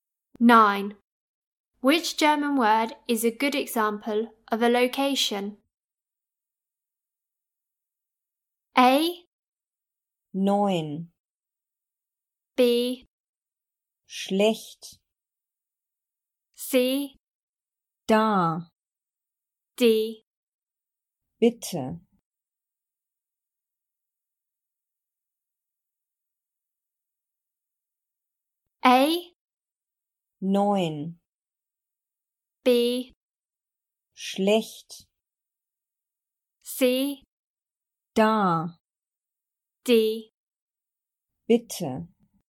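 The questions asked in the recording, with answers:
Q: Which German word is a good example of a location?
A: C: Da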